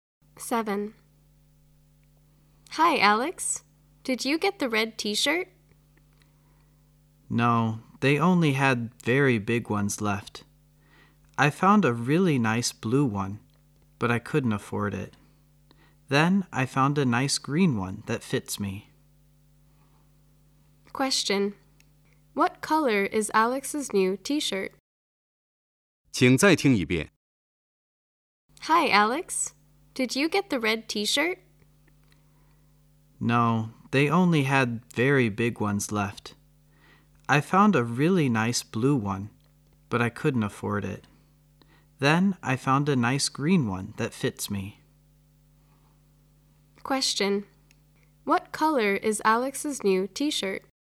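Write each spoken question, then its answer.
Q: What color is Alex's new t-shirt?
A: Green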